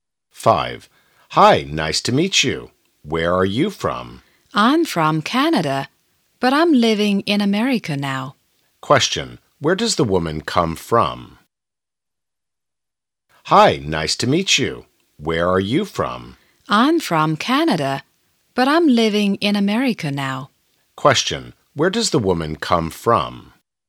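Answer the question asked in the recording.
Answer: Canada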